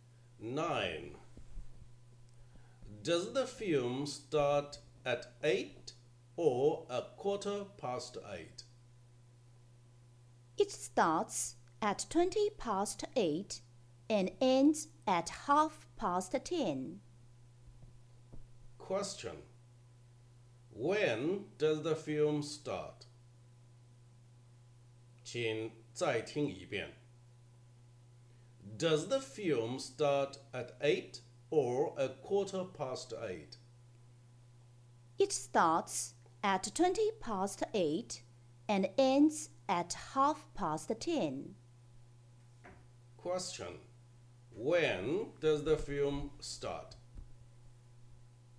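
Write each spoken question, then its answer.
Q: When does the film start?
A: At twenty past eight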